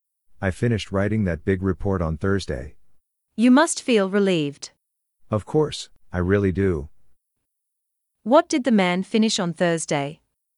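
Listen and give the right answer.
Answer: a big report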